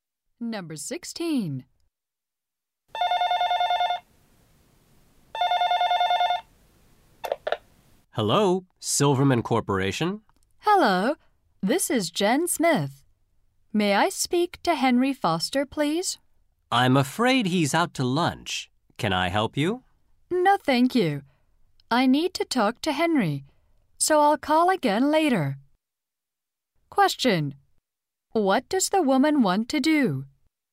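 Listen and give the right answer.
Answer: Talk to Henry Foster.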